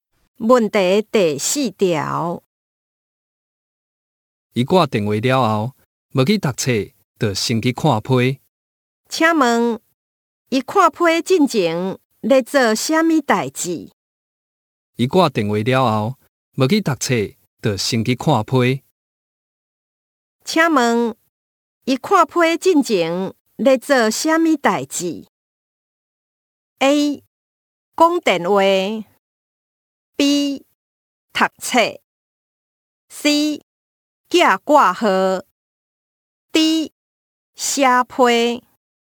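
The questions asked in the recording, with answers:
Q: 请问一看批进前在做什么代志?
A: A: 讲电话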